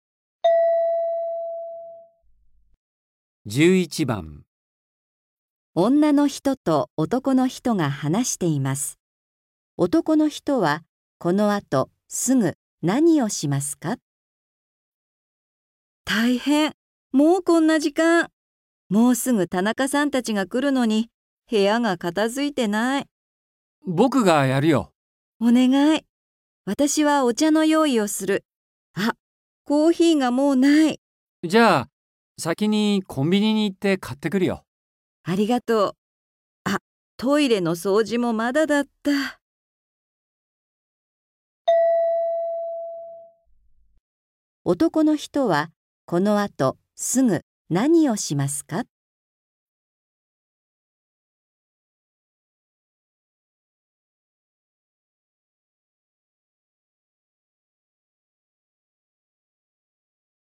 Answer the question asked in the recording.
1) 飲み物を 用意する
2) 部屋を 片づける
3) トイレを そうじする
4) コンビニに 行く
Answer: 4) コンビニに 行く

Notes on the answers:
M: じゃあ、先にコンビニに行って買ってくるよ。

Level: 初級